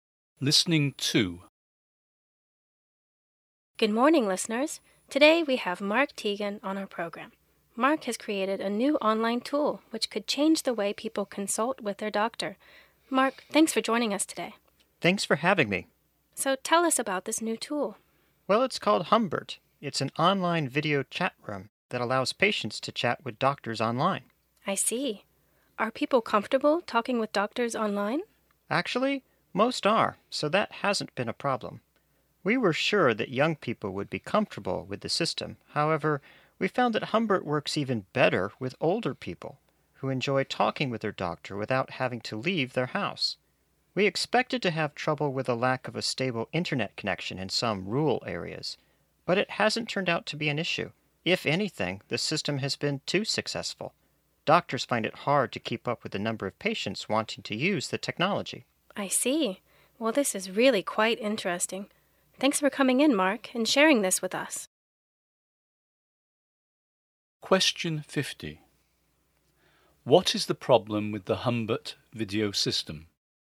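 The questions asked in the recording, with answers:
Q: What is the problem with the Humbert video system?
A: Doctors can't keep up with the number of patients who want to use it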